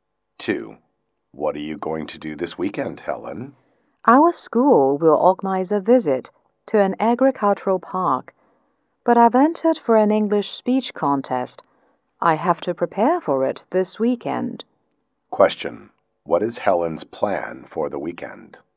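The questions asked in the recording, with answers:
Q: What is Helen's plan for the weekend?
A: To prepare for an English speech contest.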